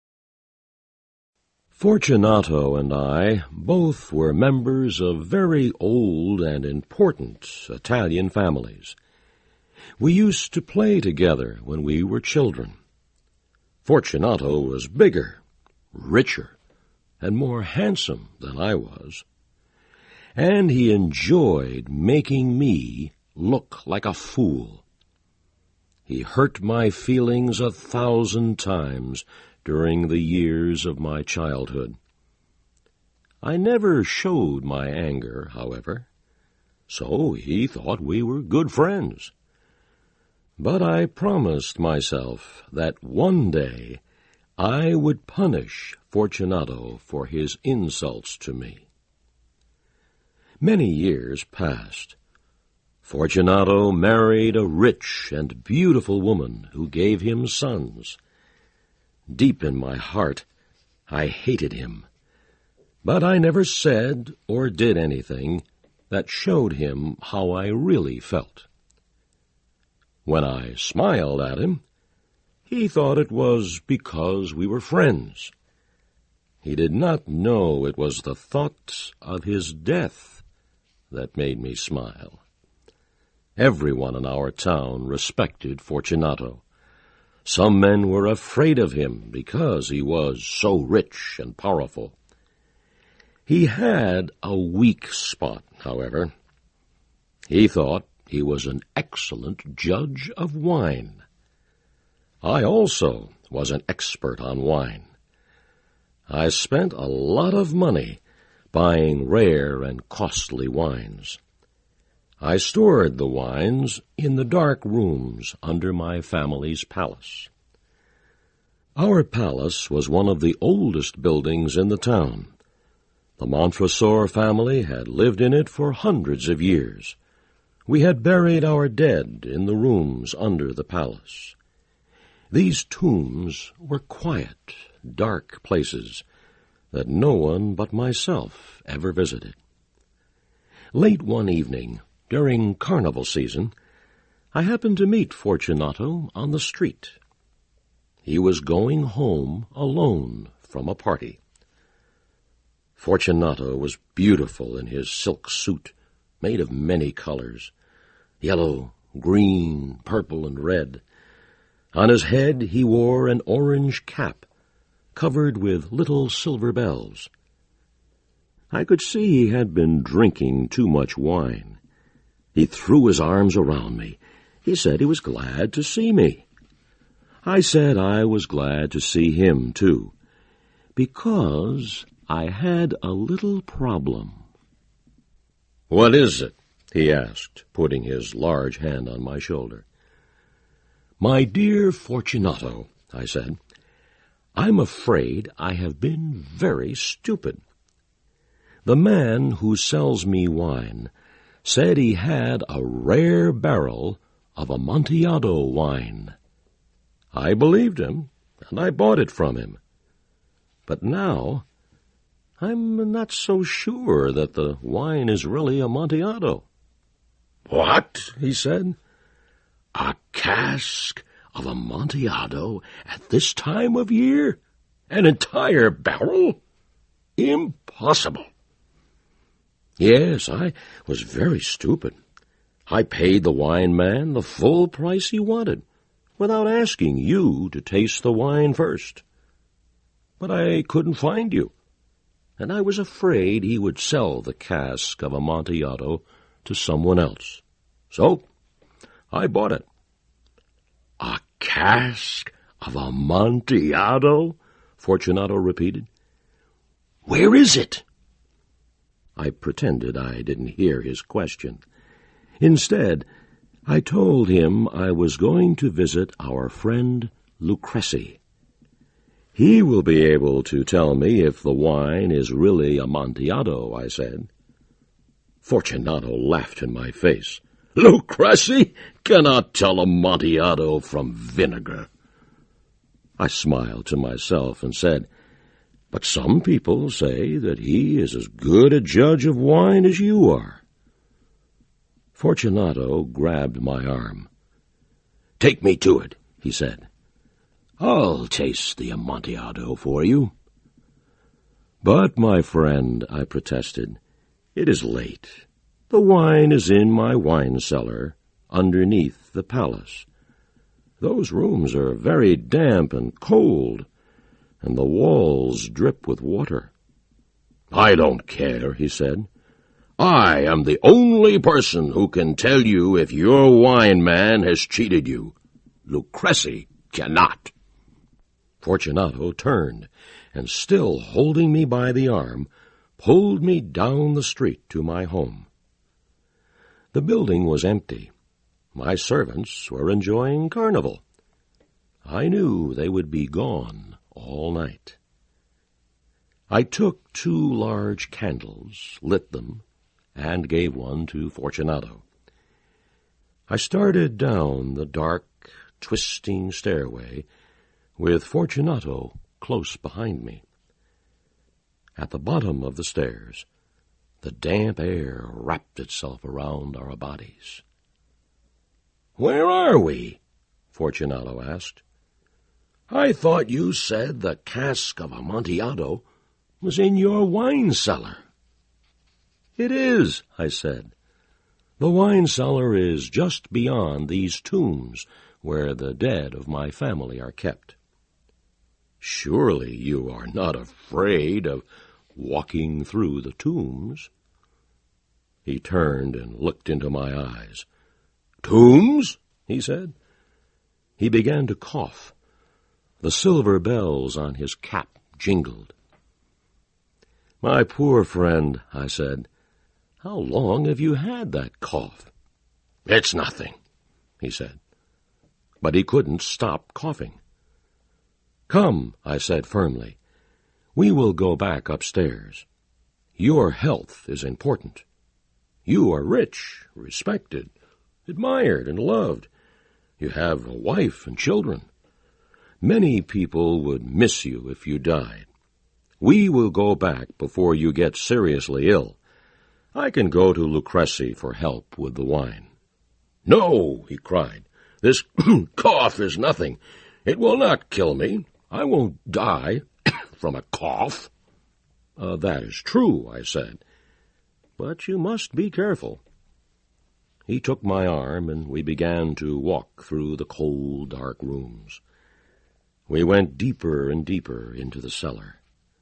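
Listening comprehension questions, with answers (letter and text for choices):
Listen carefully and for questions 1-10, choose the answer (A, B, C or D) which you think best completes each question.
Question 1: This story is set during the...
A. Christmas season.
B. Summer festival.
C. Carnival season.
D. New Year festivity.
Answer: C. Carnival season.

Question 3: In what area does Fortunato fancy himself an expert?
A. Italian history.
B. Architecture.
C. Horses.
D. Wine.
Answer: D. Wine.

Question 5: How does Fortunato know Montresor?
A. They are friends.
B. They are relatives.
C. They are colleagues.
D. They had never met before.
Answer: A. They are friends.

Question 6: What is "Amontillado"?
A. The name of the family tomb.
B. Montresor's dog.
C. A type of wine.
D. An exotic cigar.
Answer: C. A type of wine.

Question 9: What has Fortunato done to upset Montresor and caused him to vow revenge?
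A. Lied to him.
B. Stole from him.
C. Dated his sister.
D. Insulted him.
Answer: D. Insulted him.

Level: CAE - Certificate in Advanced English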